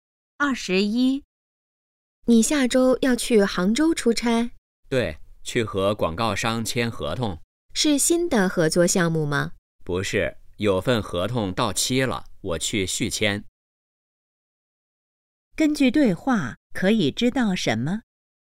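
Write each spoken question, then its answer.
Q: 根据对话可以知道什么?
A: 男的要去杭州续签合同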